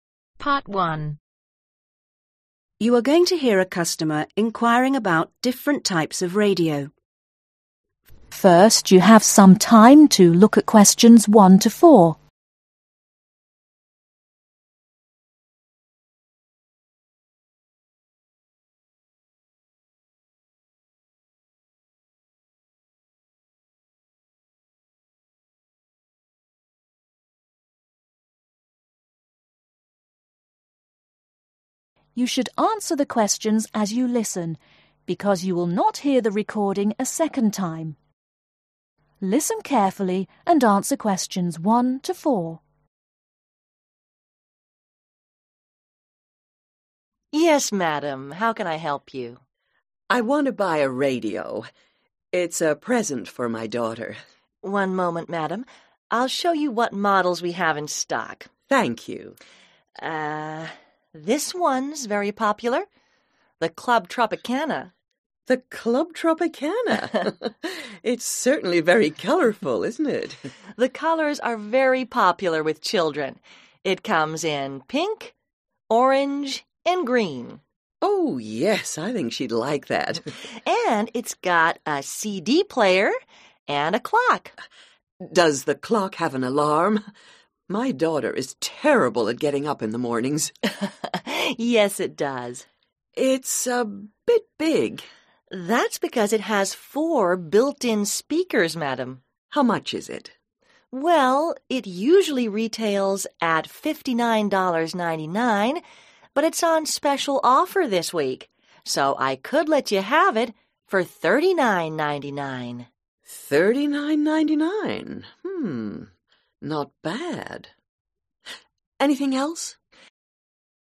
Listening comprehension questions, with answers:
Complete the notes below. Write ONE WORD AND/OR A NUMBER for each answer.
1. Color: pink, orange and (1) ............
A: green

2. Extra features: CD Player, (2) ............, alarms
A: clock

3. No. of speakers: (3) ............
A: 4

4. Price: (4) ............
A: 39.99